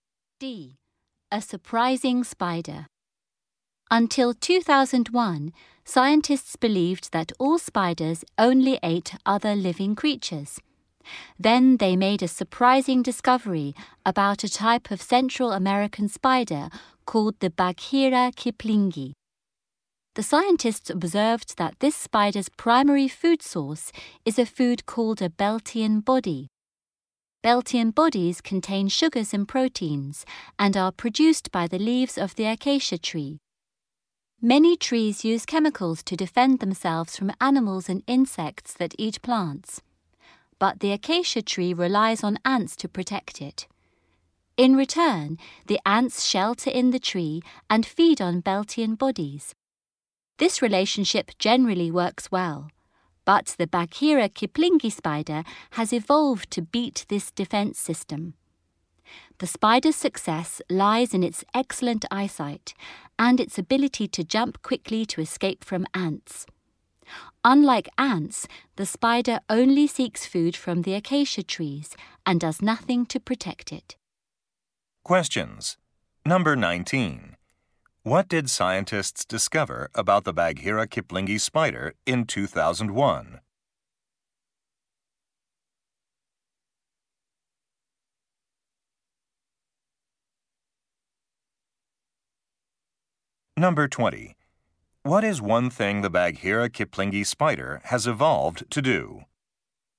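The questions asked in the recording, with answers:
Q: What did scientists discover about the Bagheera kiplingi spider in 2001?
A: It mainly eats plant food (Beltian bodies from acacia trees).

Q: What is one thing the Bagheera kiplingi spider has evolved to do?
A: Get past the acacia tree's ant defense system.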